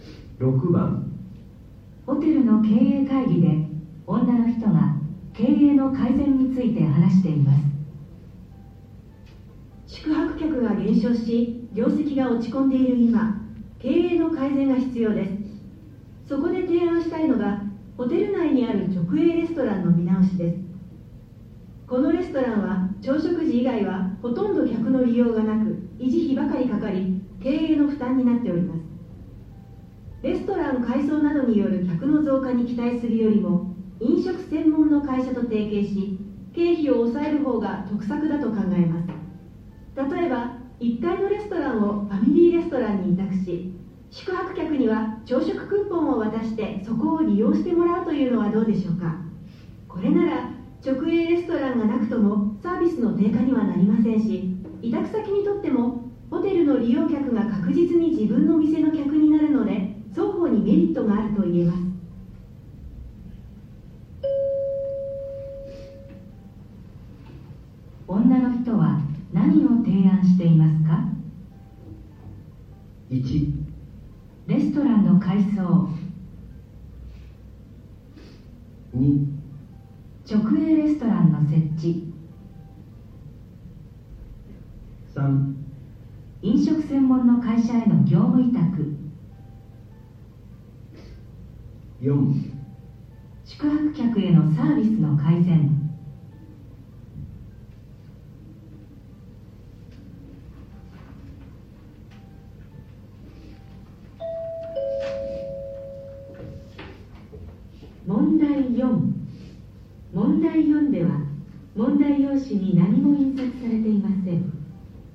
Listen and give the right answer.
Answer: 3

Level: N1 Listening · Test 1